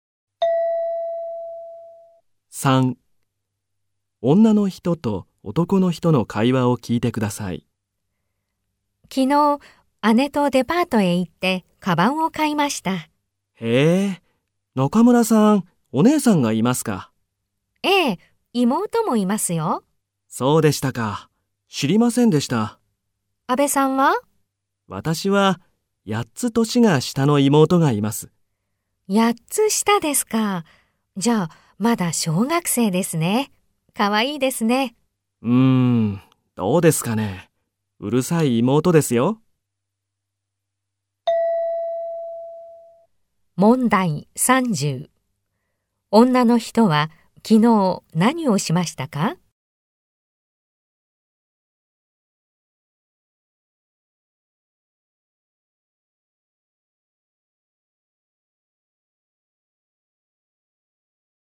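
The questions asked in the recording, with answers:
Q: 女の人は昨日何をしましたか?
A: 姉とデパートへ行ってカバンを買いました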